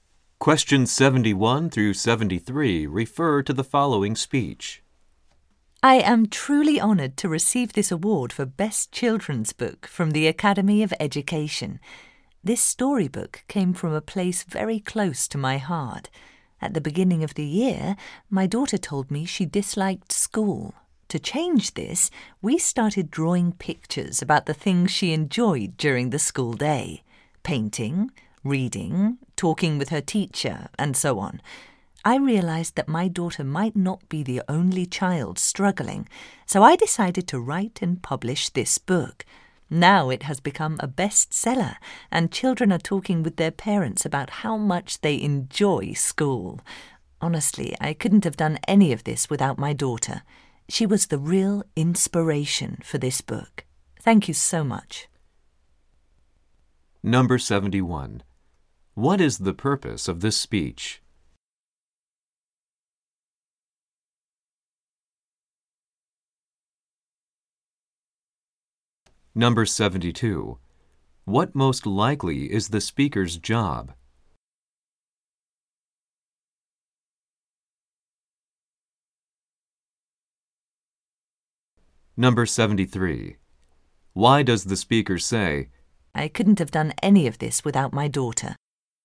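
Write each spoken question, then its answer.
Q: What is the purpose of this speech?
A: To accept an award (Best Children's Book)

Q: What most likely is the speaker's job?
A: Author / children's book writer

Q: Why does the speaker say, I couldn't have done any of this without my daughter?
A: To credit her daughter as the inspiration for the book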